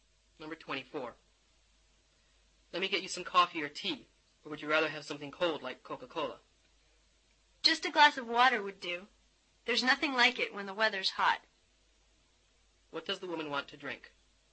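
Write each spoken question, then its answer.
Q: What does the woman want to drink?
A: A glass of water.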